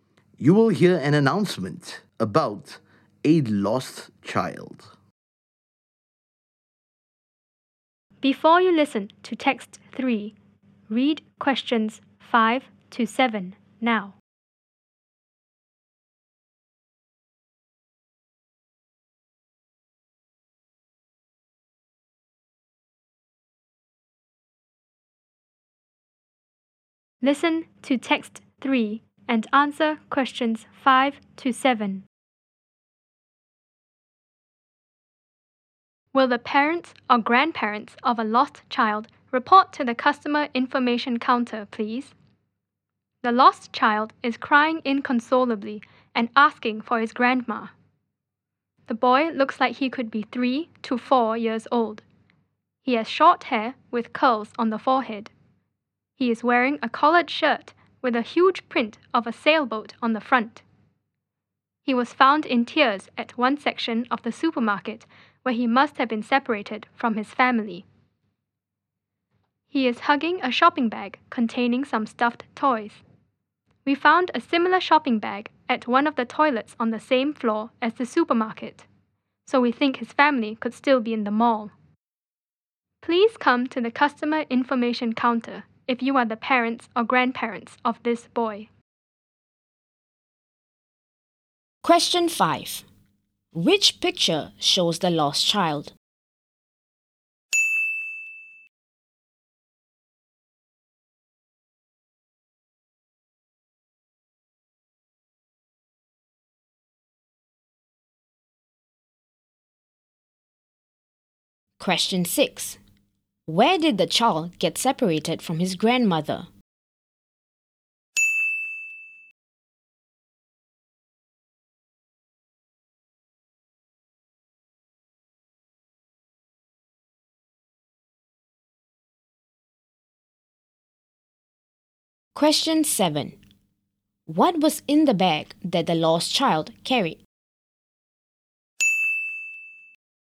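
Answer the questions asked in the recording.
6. At the supermarket
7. Some stuffed toys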